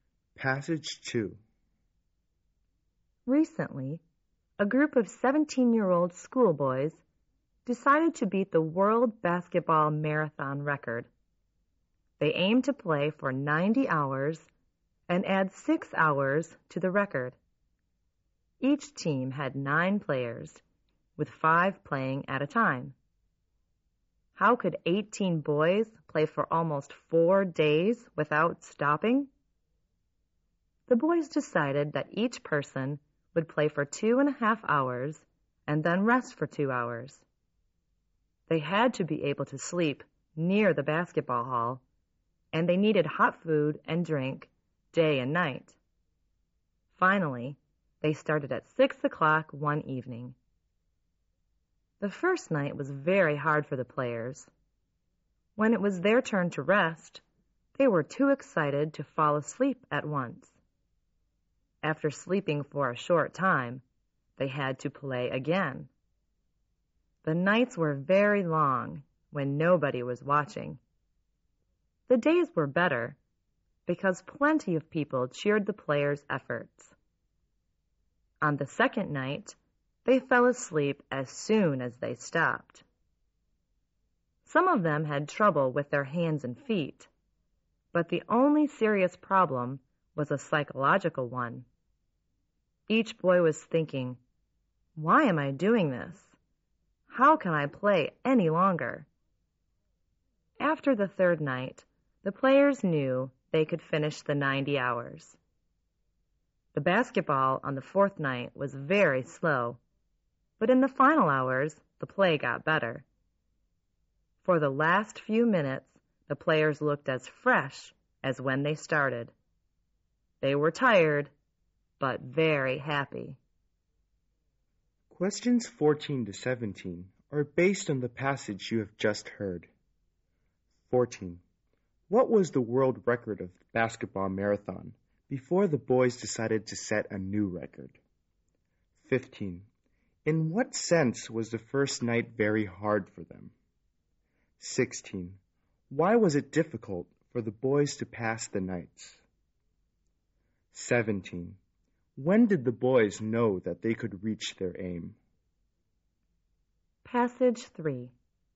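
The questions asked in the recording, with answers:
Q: What was the world record of the basketball marathon before the boys decided to set a new record?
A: 84 hours

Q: In what sense was the first night very hard for them?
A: They were too excited to fall asleep when it was time to rest.

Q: Why was it difficult for the boys to pass the nights?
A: Nobody was watching them.

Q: When did the boys know that they could reach their aim?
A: After the third night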